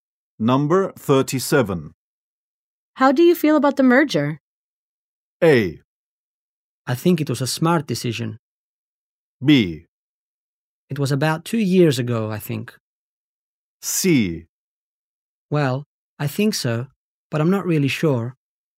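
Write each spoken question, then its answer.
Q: How do you feel about the merger?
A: A: I think it was a smart decision.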